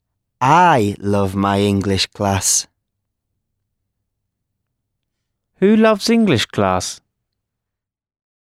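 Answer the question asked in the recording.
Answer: I (the speaker)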